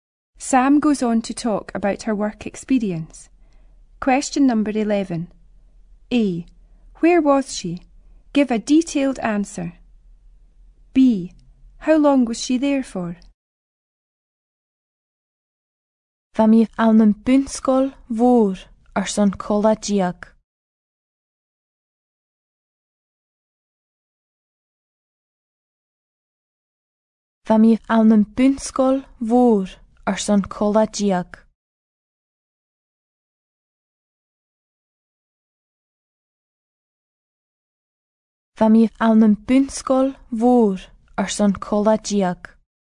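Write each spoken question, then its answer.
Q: A. Where was she?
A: In a big primary school

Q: How long was she there for?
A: A fortnight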